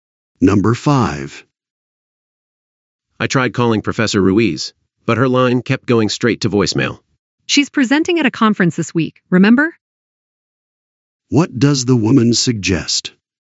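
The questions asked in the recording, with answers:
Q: What does the woman suggest?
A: The professor can't answer because she is away at a conference.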